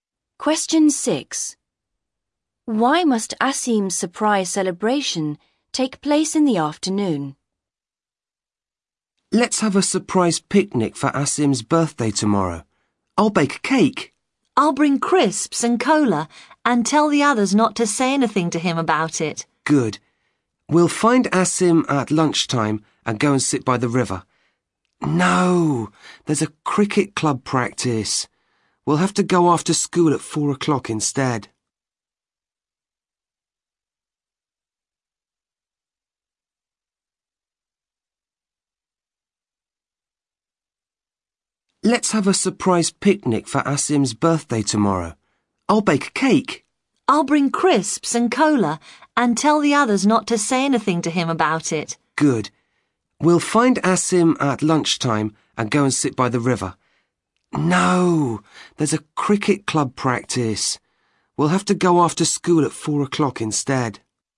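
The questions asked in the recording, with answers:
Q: Why must Asim's surprise celebration take place in the afternoon?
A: There's a cricket club practice at lunchtime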